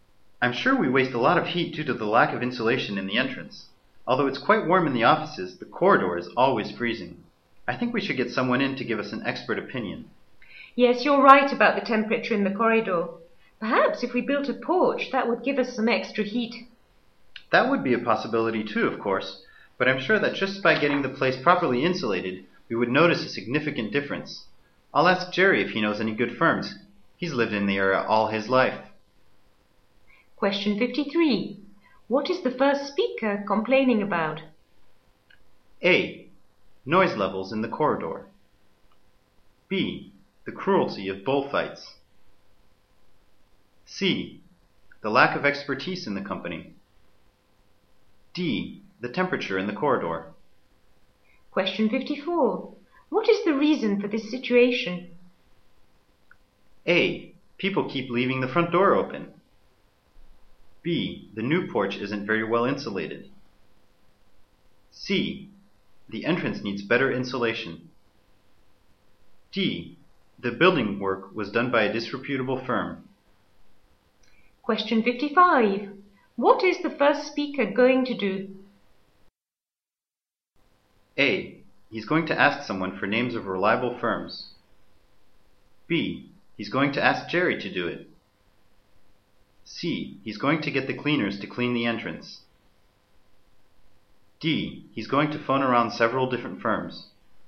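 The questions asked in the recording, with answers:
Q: What is the first speaker complaining about?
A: D: The temperature in the corridor.

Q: What is the reason for this situation?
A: C: The entrance needs better insulation.

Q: What is the first speaker going to do?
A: A: He's going to ask someone for names of reliable firms.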